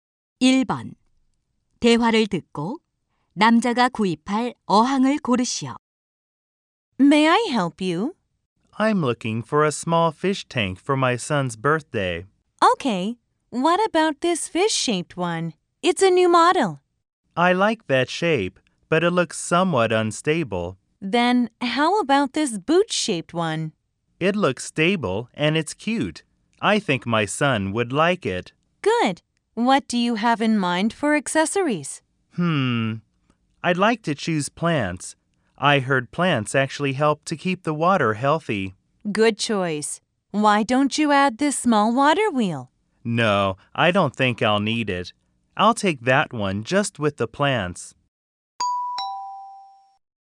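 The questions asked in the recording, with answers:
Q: 대화를 듣고 남자가 구입할 어항을 고르시오.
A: 식물만 넣은 부츠 모양 어항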